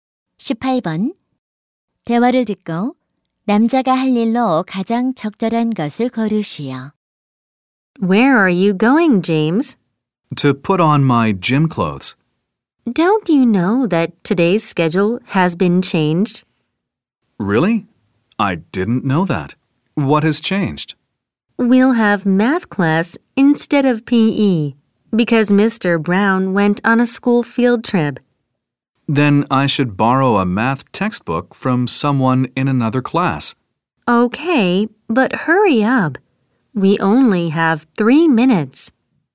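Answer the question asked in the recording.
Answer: 다른 반 친구에게 수학 교과서를 빌린다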